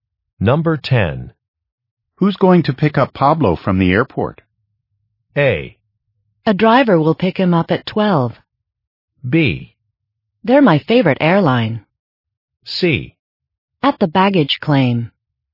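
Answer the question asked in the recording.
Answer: A: A driver will pick him up at 12.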